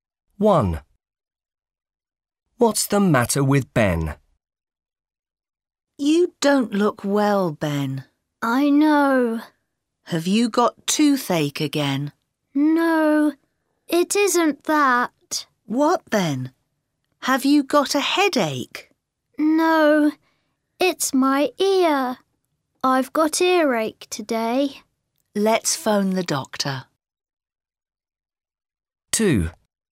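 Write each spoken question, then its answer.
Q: What's the matter with Ben?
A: He has got earache.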